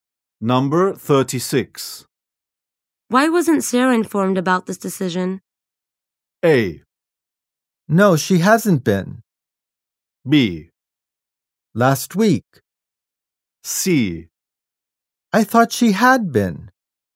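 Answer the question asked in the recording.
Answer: C: I thought she had been.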